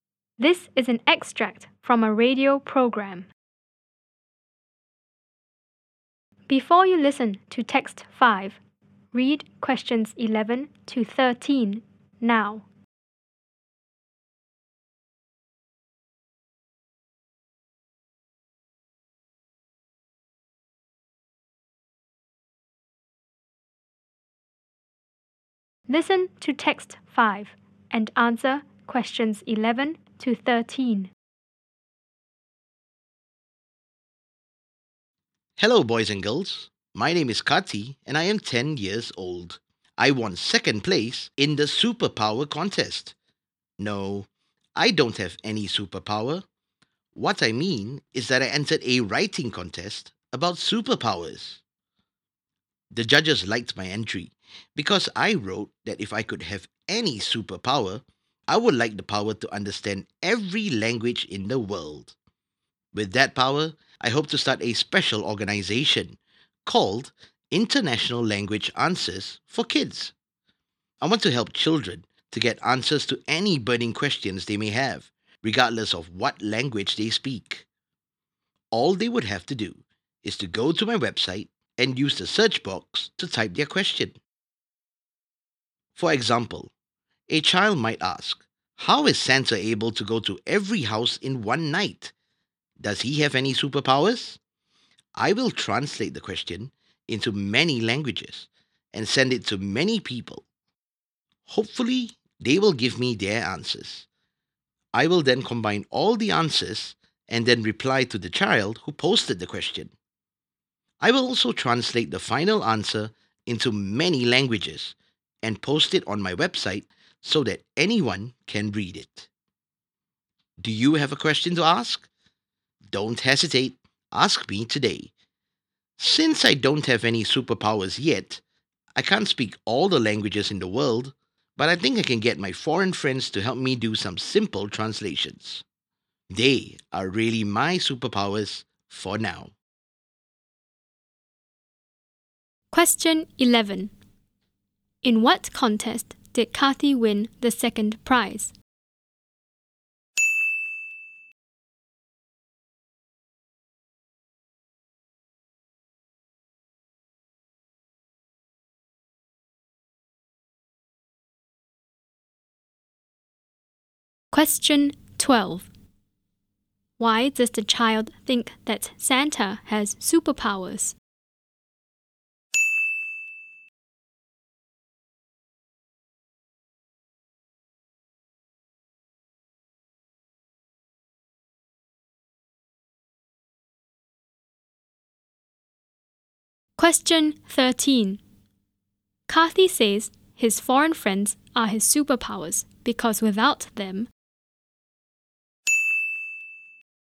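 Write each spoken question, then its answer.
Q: In what contest did Kathy win the second prize?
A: A writing contest about superpowers

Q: Why does the child think that Santa has superpowers?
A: Because he is able to go to every house in one night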